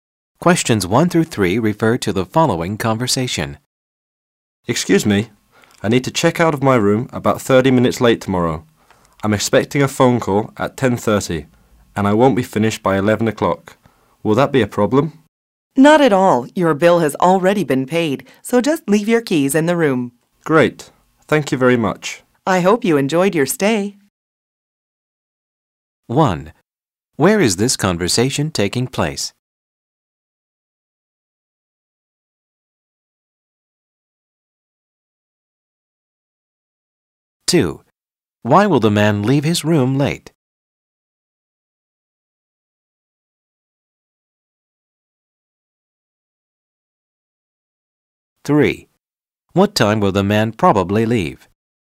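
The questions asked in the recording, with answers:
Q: Where is this conversation taking place?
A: At a hotel

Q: Why will the man leave his room late?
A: He is expecting a phone call at 10:30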